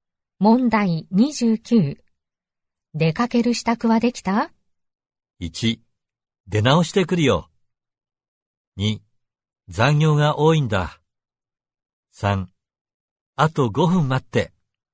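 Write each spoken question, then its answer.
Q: 出かける支度はできた?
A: 3: あと5分待って。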